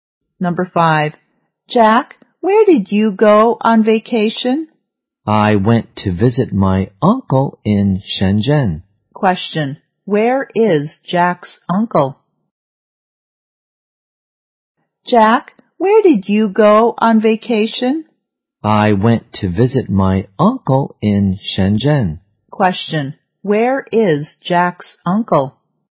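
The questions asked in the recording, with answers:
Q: Where is Jack's uncle?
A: In Shenzhen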